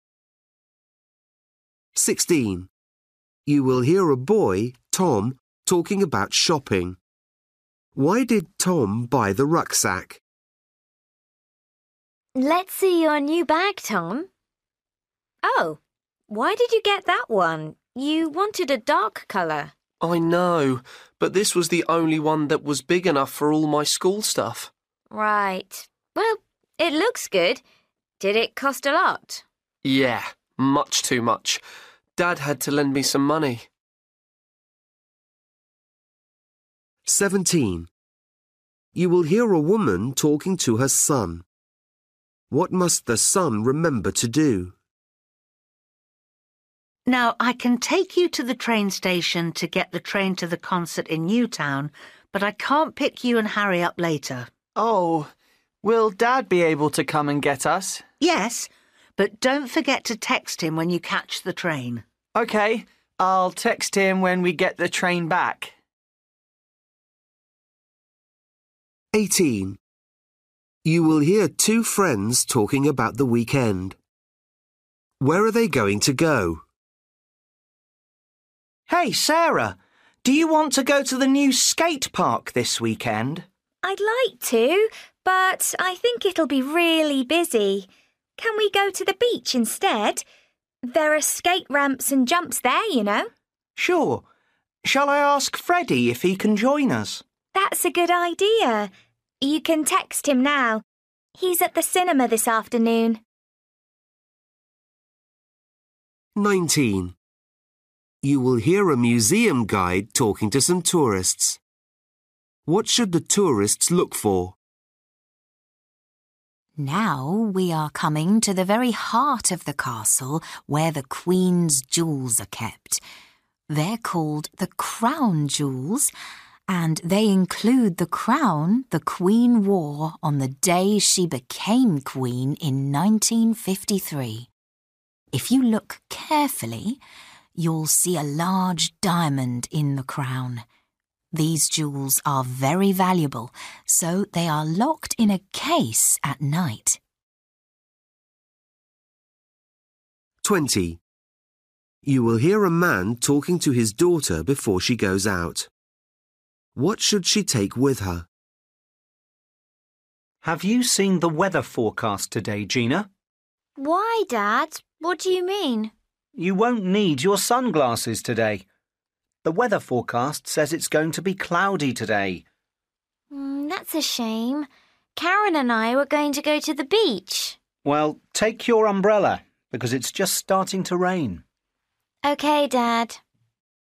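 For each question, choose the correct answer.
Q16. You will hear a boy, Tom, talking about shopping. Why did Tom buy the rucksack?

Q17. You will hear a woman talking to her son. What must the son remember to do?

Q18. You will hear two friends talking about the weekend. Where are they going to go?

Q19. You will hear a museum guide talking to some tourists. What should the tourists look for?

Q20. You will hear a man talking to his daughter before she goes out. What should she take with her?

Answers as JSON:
{"16": "It was the only one big enough for his school stuff", "17": "Text his dad when he catches the train back", "18": "The beach", "19": "A large diamond in the crown", "20": "Her umbrella"}

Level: Luyện nghe trình độ A2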